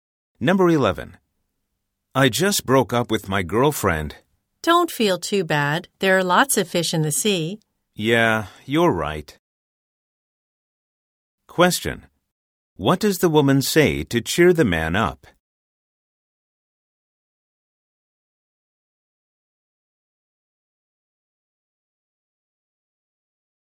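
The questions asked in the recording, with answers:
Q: What does the woman say to cheer the man up?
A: There are lots of other people he could date.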